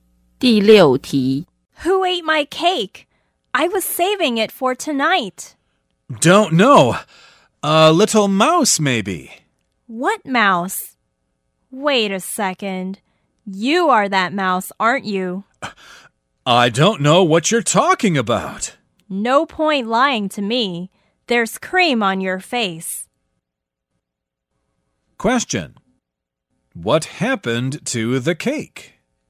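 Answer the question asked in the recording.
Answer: The other person ate it.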